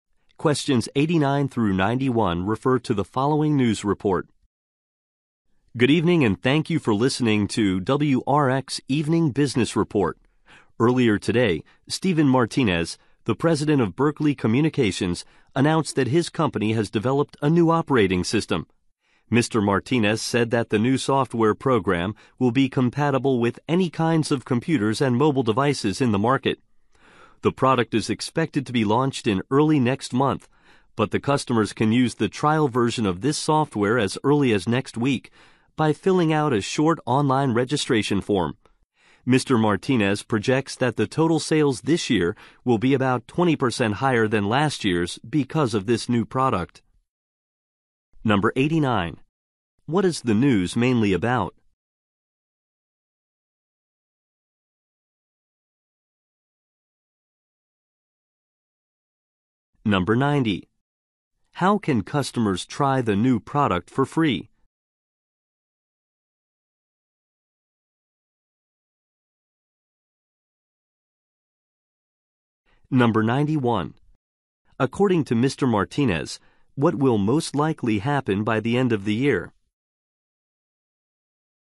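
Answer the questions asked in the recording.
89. A new operating system developed by Berkeley Communications
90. By filling out a short online registration form
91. Sales will be about 20% higher than last year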